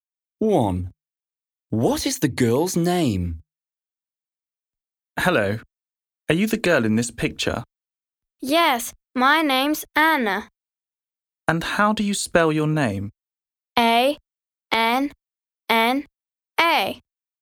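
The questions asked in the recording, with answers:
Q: What is the girl's name?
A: Anna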